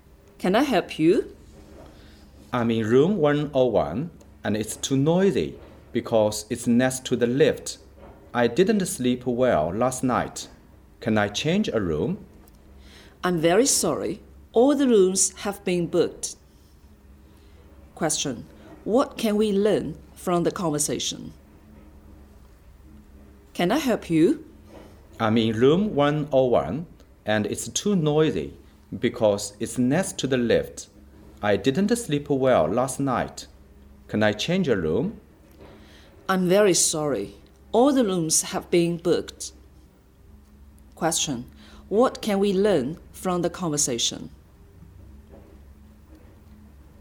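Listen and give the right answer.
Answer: The man can't change his room because all the rooms have been booked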